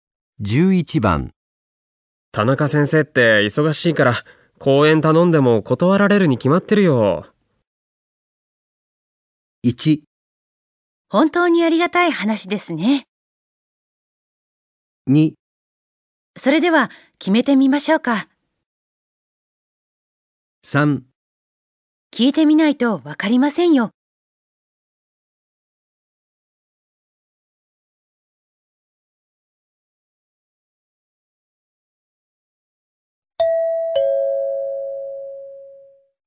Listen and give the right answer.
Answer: 3

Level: N2 Listening · Test 3